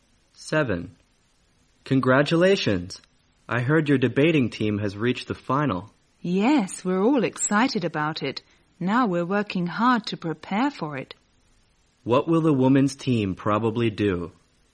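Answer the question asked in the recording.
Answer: Prepare hard for the final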